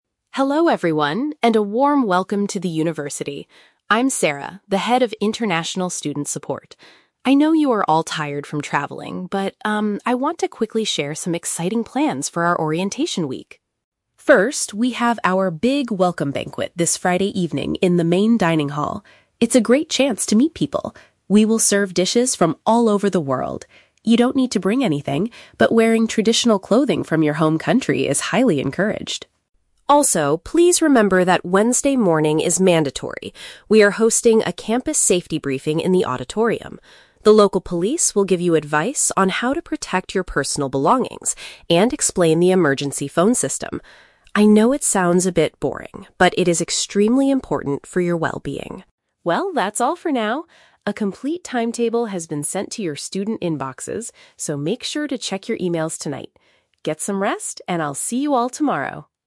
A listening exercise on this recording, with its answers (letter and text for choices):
Listen to the welcome speech by the Head of International Student Support. Read the questions below and choose the correct answer (A, B, or C) for each.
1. What are the new students asked to do for the Friday evening event?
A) Prepare and bring international meals to share with others.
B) Put on traditional garments from their native cultures.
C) Pay a small fee to enter the main dining hall.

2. What is the primary purpose of the session on Wednesday morning?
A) To learn how to keep their items secure and contact help.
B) To register for their first-semester classes in the auditorium.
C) To take a guided walking tour of the local police station.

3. How can the students find out about the rest of the week's activities?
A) By collecting a printed timetable directly from the speaker.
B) By visiting the university's official student support website.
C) By looking at the digital messages sent to them by the school.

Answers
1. B) Put on traditional garments from their native cultures.
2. A) To learn how to keep their items secure and contact help.
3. C) By looking at the digital messages sent to them by the school.

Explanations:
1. The Key (Correct): The speaker says, "wearing traditional clothing from your home country is highly encouraged!" (Paraphrased: wearing traditional clothing = put on traditional garments; home country = native cultures). The Trap: Option (A) is incorrect. The speaker explicitly says "You don't need to bring anything" regarding food, as the university will "serve dishes from all over the world." Not mentioned: Option (C) is plausible for a banquet, but an entrance fee is never mentioned in the audio.
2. The Key (Correct): The Wednesday session is a safety briefing to learn how to "protect your personal belongings" (keep items secure) and understand the "emergency phone system" (contact help). The Trap: Option (B) is a trap. The word "auditorium" is used in the audio, but the event is a safety briefing, not a class registration session. Not mentioned: Option (C) mentions "police," but the police are coming to the auditorium; the students are not taking a tour of the police station.
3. The Key (Correct): Sarah states that a complete timetable has been "sent to your student inboxes" and tells them to "check your emails tonight." (Paraphrased: emails/inboxes = digital messages). The Trap: Option (A) uses the word "timetable", but the timetable is sent digitally, not handed out as a printed document by Sarah. Not mentioned: Option (B) is a logical way to check a schedule, but checking the website is not what Sarah instructed them to do.

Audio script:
Sarah: Hello everyone, and a warm welcome to the university! I'm Sarah, the Head of International Student Support. I know you are all tired from traveling, but, um, I want to quickly share some exciting plans for our Orientation Week.
First, we have our big Welcome Banquet this Friday evening in the main dining hall. It's a great chance to meet people. We will serve dishes from all over the world. You don't need to bring anything, but wearing traditional clothing from your home country is highly encouraged!
Also, please remember that Wednesday morning is mandatory. We are hosting a campus safety briefing in the auditorium. The local police will give you advice on how to protect your personal belongings and explain the emergency phone system. I know it sounds a bit boring, but it is extremely important for your well-being.
Well, that's all for now. A complete timetable has been sent to your student inboxes, so make sure to check your emails tonight. Get some rest, and I'll see you all tomorrow!